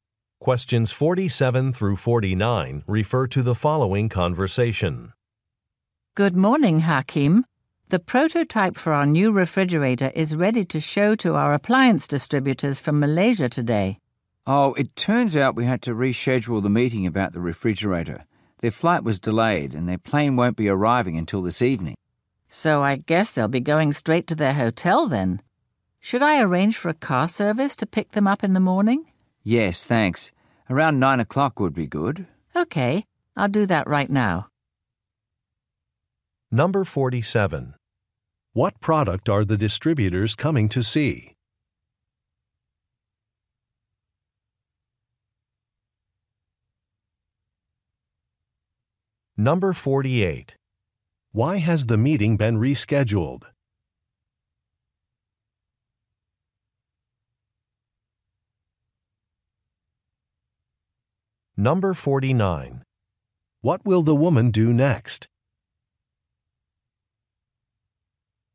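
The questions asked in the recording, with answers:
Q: What product are the distributors coming to see?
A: A refrigerator

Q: Why has the meeting been rescheduled?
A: The distributors' flight was delayed

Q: What will the woman do next?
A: Arrange a car service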